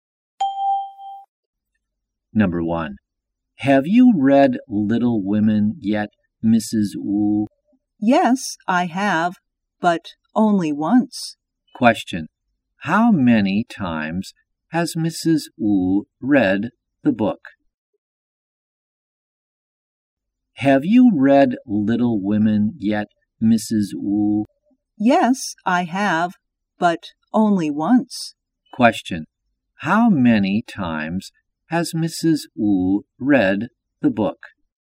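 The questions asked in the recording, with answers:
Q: how many times has Mrs. Wu read the book?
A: Once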